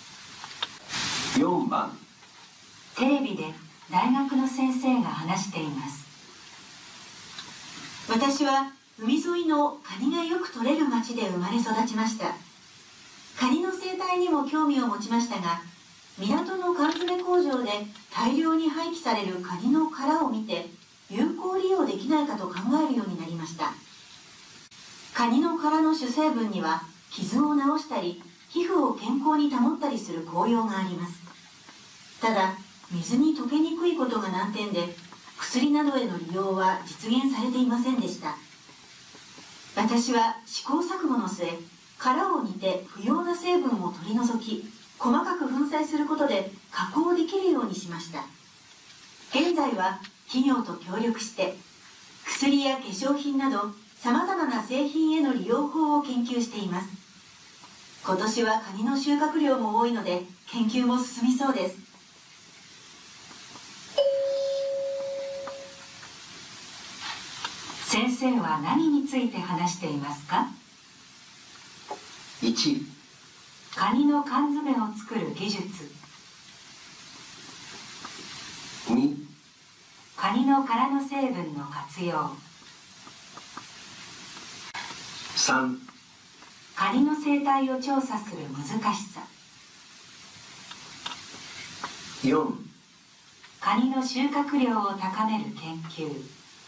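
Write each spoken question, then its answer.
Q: 先生は何について話していますか?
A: 2: カニの殻の成分の活用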